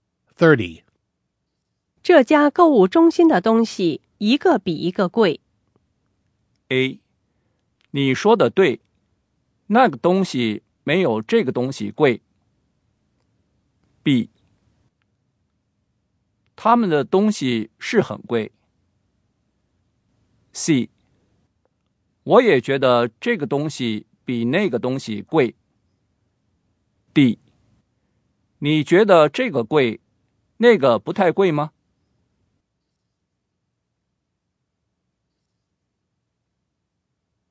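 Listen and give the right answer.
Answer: B: 他们的东西是很贵。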